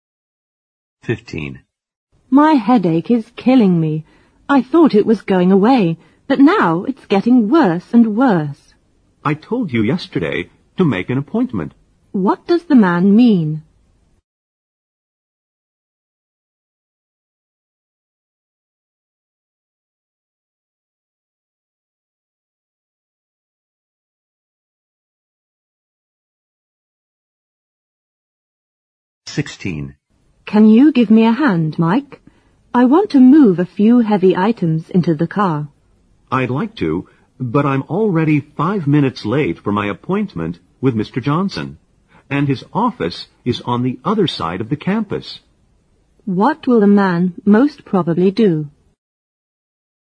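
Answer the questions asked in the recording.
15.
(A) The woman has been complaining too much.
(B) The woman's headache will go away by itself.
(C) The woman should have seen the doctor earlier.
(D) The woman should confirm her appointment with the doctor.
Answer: (C) The woman should have seen the doctor earlier.
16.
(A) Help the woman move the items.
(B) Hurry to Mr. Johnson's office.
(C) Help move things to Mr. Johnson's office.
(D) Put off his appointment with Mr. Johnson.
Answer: (B) Hurry to Mr. Johnson's office.

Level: 四级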